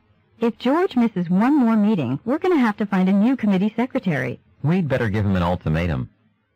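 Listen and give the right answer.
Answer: Warn George that he'll be replaced as secretary if he misses another meeting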